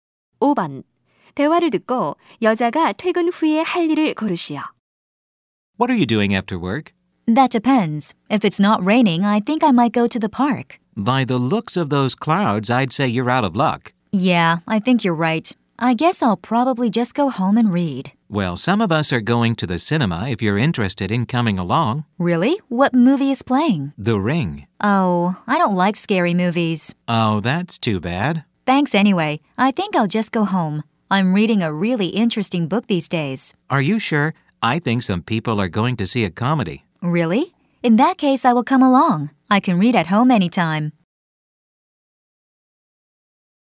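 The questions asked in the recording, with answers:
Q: 대화를 듣고 여자가 퇴근 후에 할 일을 고르시오.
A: 동료들과 영화(코미디) 보러 가기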